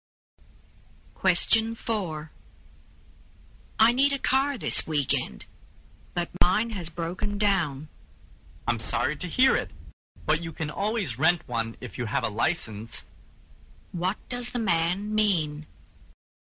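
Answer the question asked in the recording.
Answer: The woman can rent a car if she has a license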